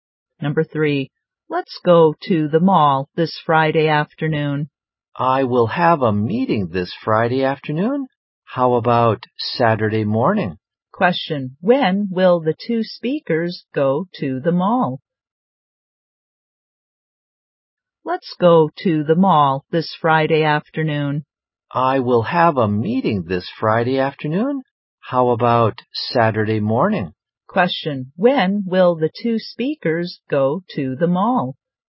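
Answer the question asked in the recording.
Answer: On Saturday morning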